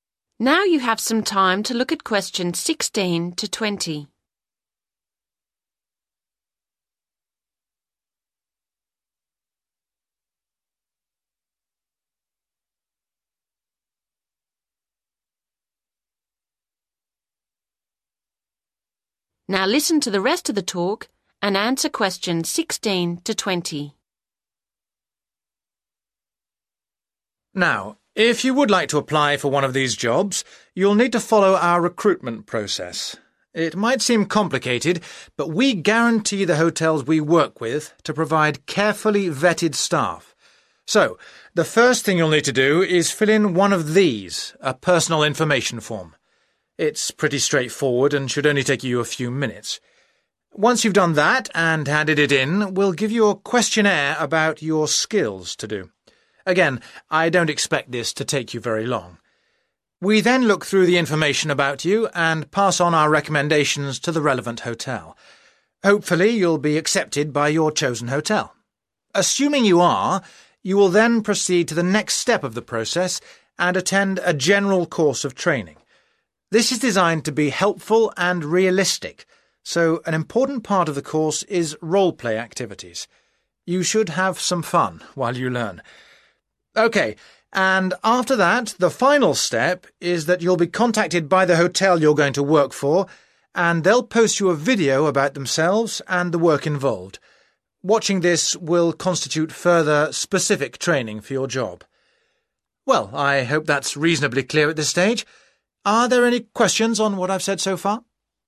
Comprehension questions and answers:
Complete the flow chart below. Write NO MORE THAN TWO WORDS for each answer.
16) Step 1: Complete a (16) form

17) Step 2: Do a (17) questionnaire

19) includes (19) activities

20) Step 4: Will be sent a (20) about the hotel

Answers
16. personal information
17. skills
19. role-play
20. video